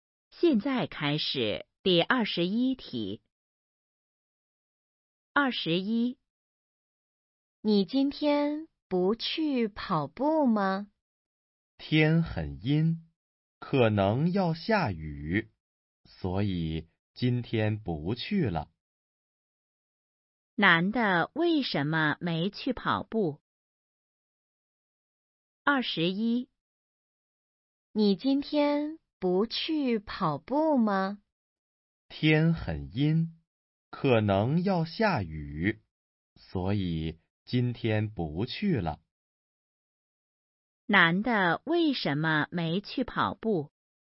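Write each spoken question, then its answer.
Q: 男的为什么没去跑步?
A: 天很阴,可能要下雨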